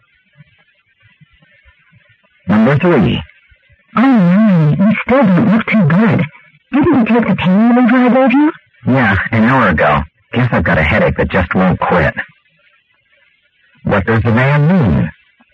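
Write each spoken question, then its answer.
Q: What does the man mean?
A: He took the pain reliever but still has a headache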